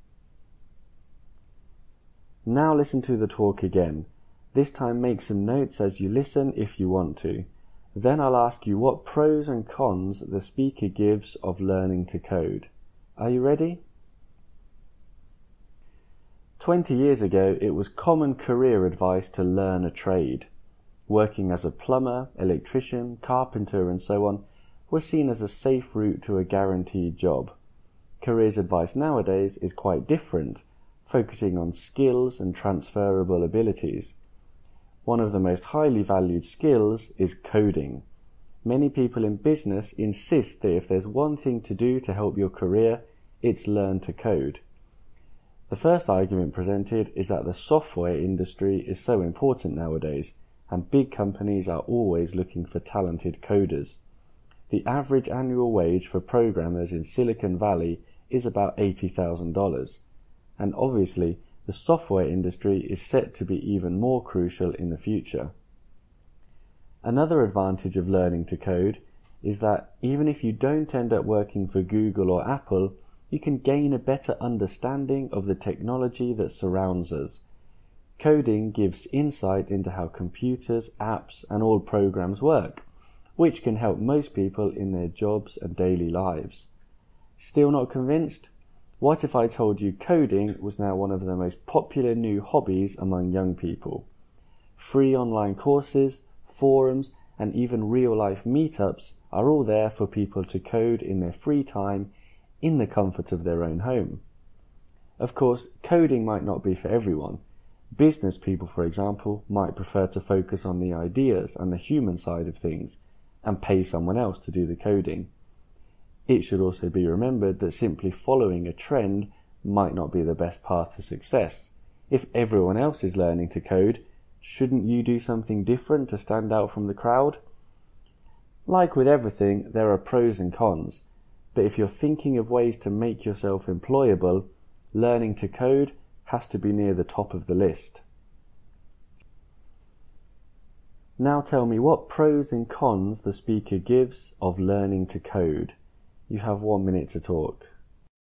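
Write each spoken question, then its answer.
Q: Now tell me what pros and cons the speaker gives of learning to code.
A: Pros: software industry is important and pays well, it helps you understand technology, it's a popular hobby with free resources. Cons: not for everyone (business people may pay coders), following a trend may not help you stand out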